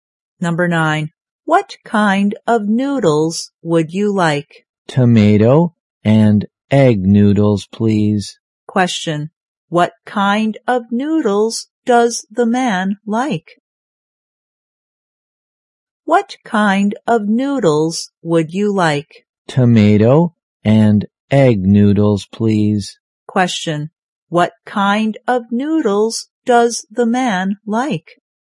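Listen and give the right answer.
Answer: Tomato and egg noodles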